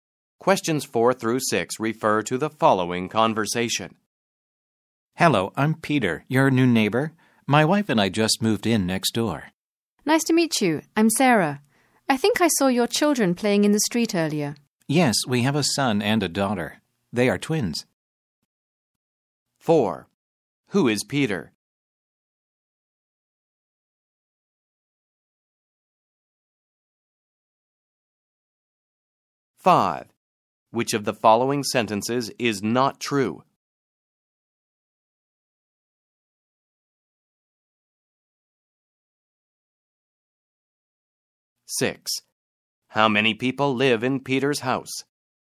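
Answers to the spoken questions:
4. Sarah's new neighbor
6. Four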